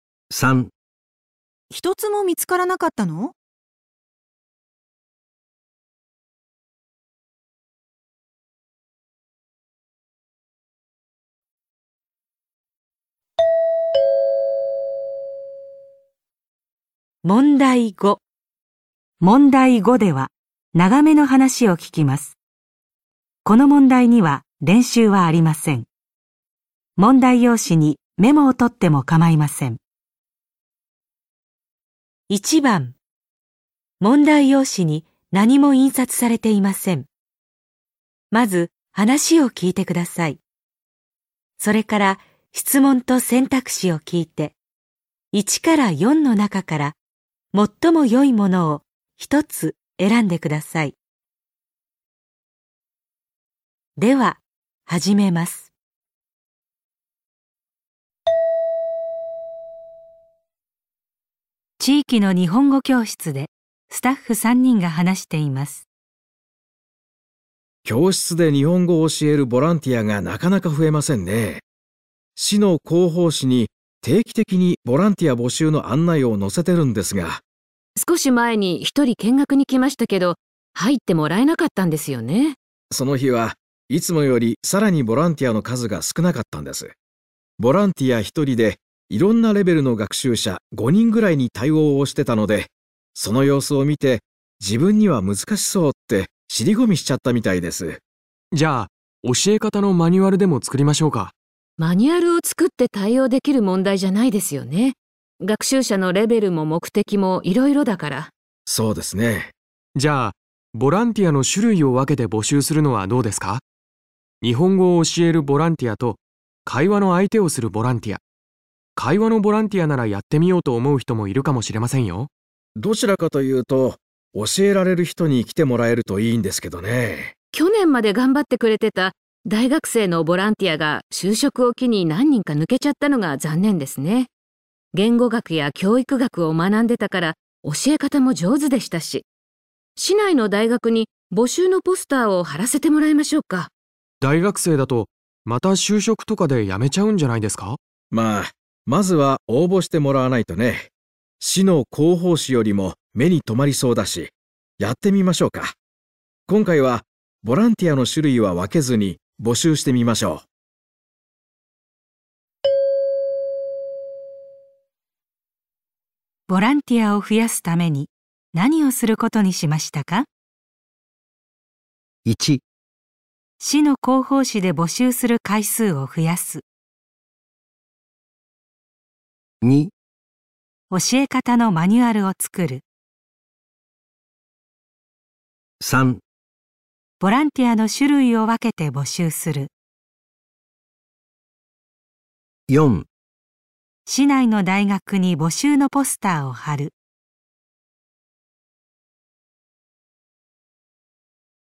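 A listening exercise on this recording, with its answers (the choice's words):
問題5では、長めの話を聞きます。この問題には練習はありません。メモをとってもかまいません。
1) ボランティアを増やすために何をすることにしましたか?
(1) 市の広報誌で募集する回数を増やす。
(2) 教え方のマニュアルを作る。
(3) ボランティアの種類を分けて募集する。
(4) 市内の大学に募集のポスターを貼る。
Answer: 市内の大学に募集のポスターを貼る。

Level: N1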